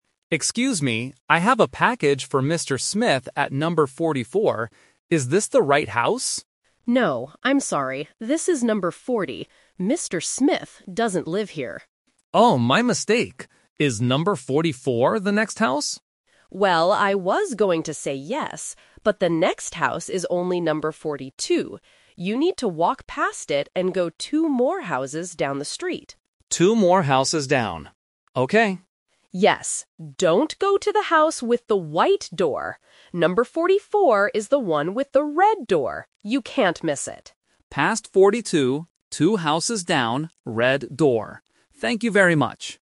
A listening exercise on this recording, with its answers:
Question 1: What is the number of the house the shipper is at right now?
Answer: Number 40.

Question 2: Where does the shipper need to go to find number 44?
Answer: Two houses down the street.

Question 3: What does number 44 look like?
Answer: It has a red door.

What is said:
Shipper: Excuse me, I have a package for Mr. Smith at number 44. Is this the right house?
Homeowner: No, I'm sorry. This is number 40. Mr. Smith doesn't live here.
Shipper: Oh, my mistake. Is number 44 the next house?
Homeowner: Well, I was going to say yes, but the next house is only number 42. You need to walk past it and go two more houses down the street.
Shipper: Two more houses down. Okay.
Homeowner: Yes. Don't go to the house with the white door. Number 44 is the one with the red door. You can't miss it.
Shipper: Past 42, two houses down, red door. Thank you very much!